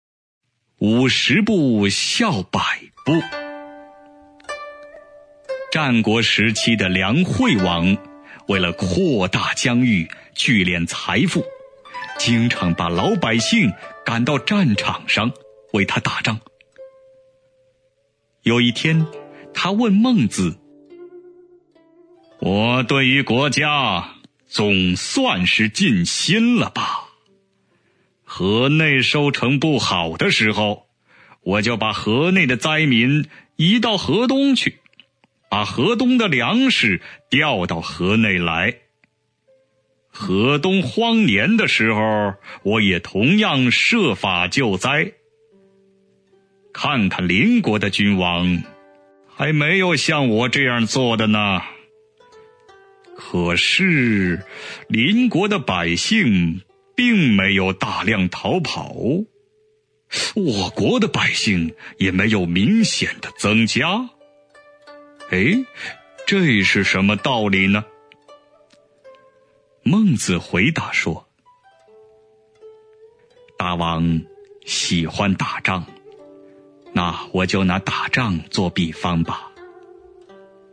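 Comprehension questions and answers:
★音声を聞き、空欄〇に当てはまる単語を探して、授業内課題用紙に漢字とピンインを書いてください。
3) 〇〇把老百姓赶到战场上,为他打仗。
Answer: 经常 jīngcháng

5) "我对于〇〇总算是尽心了吧。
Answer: 国家 guójiā

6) 河内收成不好的〇〇,我就把河内的灾民移到河东去,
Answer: 时候 shíhou

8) 河东荒年的〇〇,我也同样设法救灾。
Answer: 时候 shíhou

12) 这是〇〇道理呢?"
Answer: 什么 shénme

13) 孟子〇〇说:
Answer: 回答 huídá

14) "大王〇〇打仗。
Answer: 喜欢 xǐhuan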